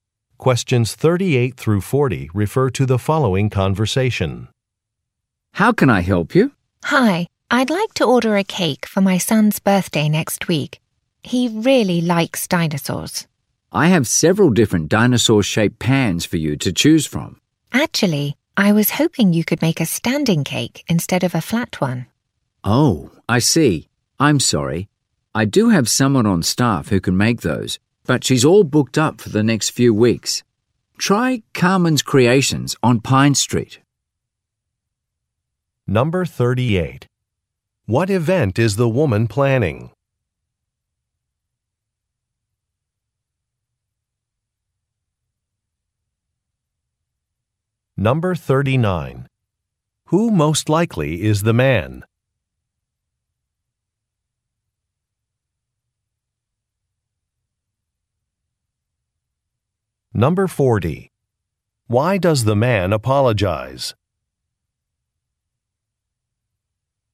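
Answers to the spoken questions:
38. Her son's birthday party
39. A baker
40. The staff member who makes standing cakes is booked for weeks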